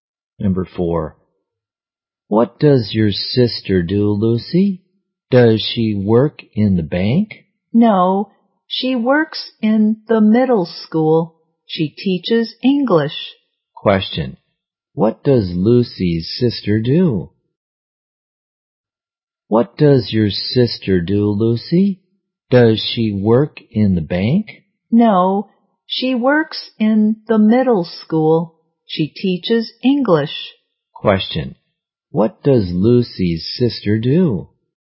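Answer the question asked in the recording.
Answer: She is an English teacher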